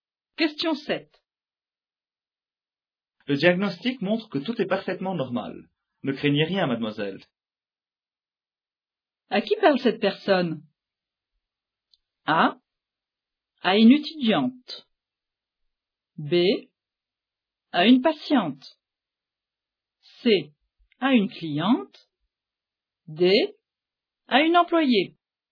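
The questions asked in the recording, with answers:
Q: À qui parle cette personne?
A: B: À une patiente.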